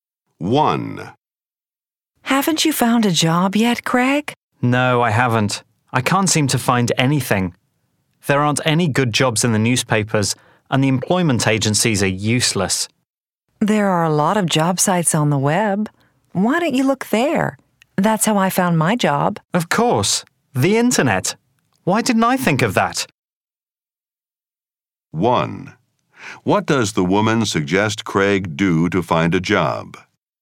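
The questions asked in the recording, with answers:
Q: What does the woman suggest Craig do to find a job?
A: Look for jobs on internet job sites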